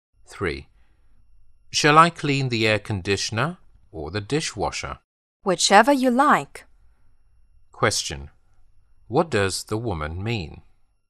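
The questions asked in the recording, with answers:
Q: What does the woman mean?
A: Either one is fine; it doesn't matter to her.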